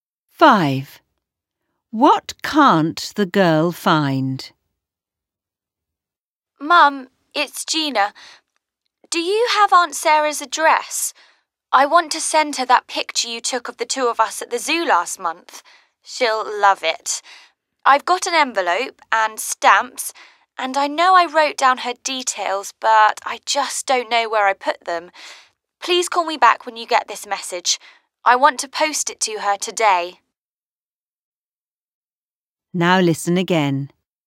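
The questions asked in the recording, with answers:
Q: What can't the girl find?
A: Aunt Sarah's address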